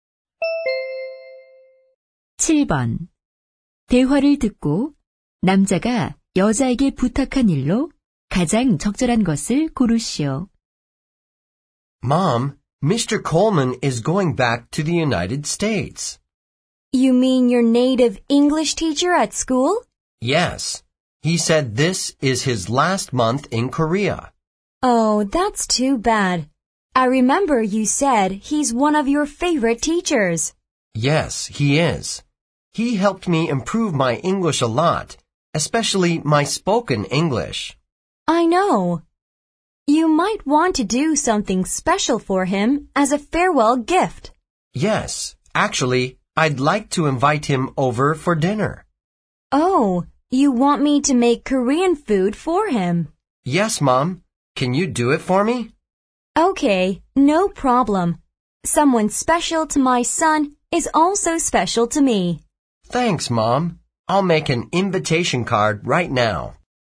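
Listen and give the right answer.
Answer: 선생님을 위해 한국 음식 만들기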